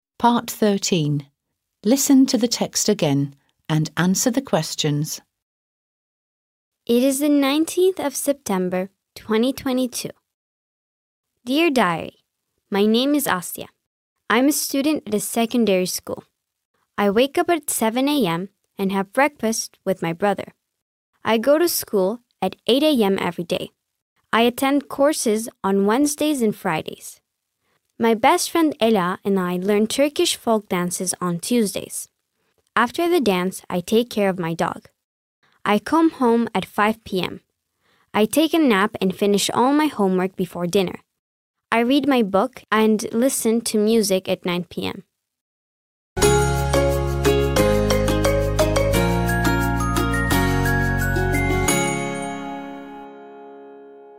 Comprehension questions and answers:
13. Listen to the text again and answer the questions.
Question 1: What is the date?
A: It's the nineteenth of September, twenty twenty-two.

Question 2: What time does Asya go to school?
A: She goes to school at 8 a.m.

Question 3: Does she attend courses on Fridays?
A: Yes, she does.

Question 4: What does she do on Tuesdays?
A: She learns Turkish folk dances on Tuesdays.

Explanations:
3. Çarşamba ve Cuma günleri kurslara katılır.

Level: 6. Sınıf